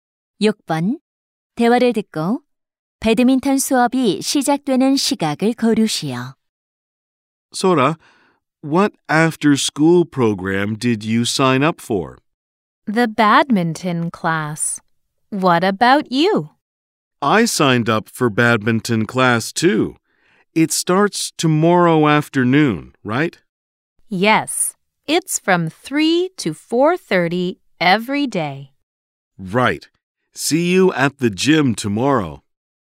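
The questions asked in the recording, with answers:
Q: 대화를 듣고 배드민턴 수업이 시작되는 시각을 고르시오.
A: 3시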